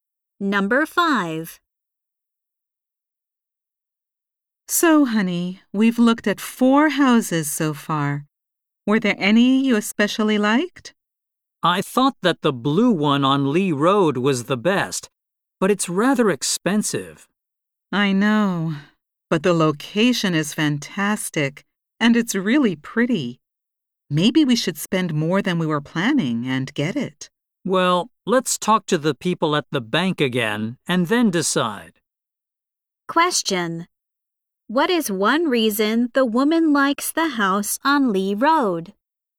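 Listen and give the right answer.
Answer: Its location is fantastic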